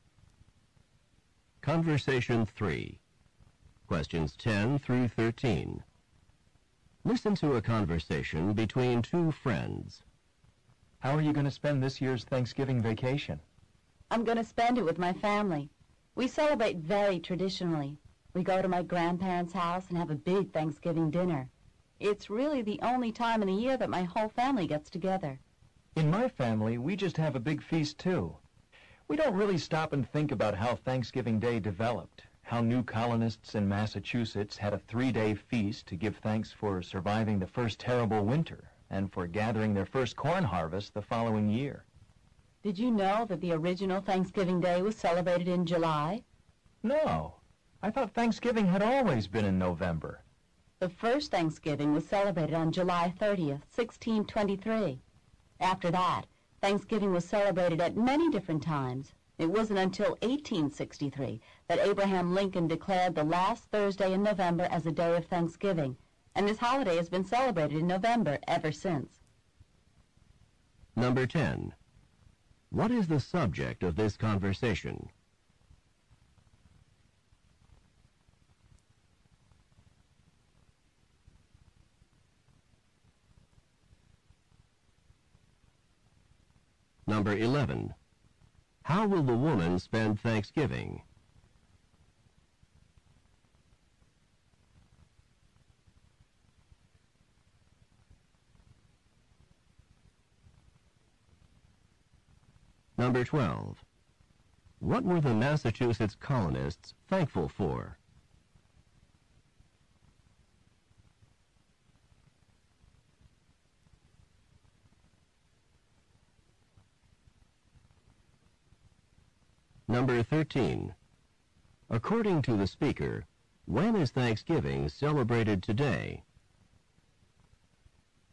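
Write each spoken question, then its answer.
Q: What is the subject of this conversation?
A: Thanksgiving and its history

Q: How will the woman spend Thanksgiving?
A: With her family at her grandparents' house

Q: What were the Massachusetts colonists thankful for?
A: Surviving the first winter and their first corn harvest

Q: According to the speaker, when is Thanksgiving celebrated today?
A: The last Thursday in November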